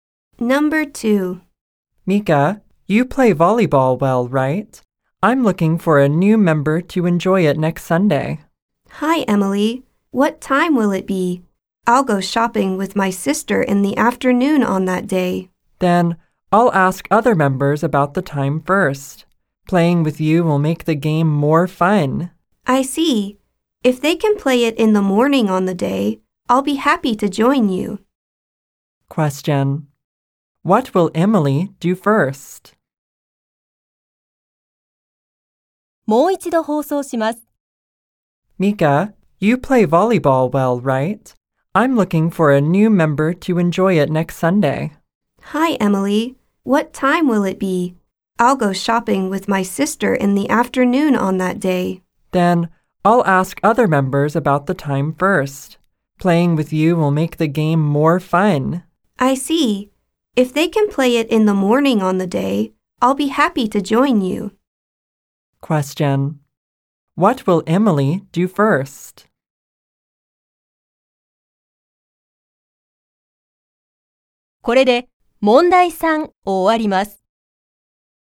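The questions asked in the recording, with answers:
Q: What will Emily do first?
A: Ask other members about the time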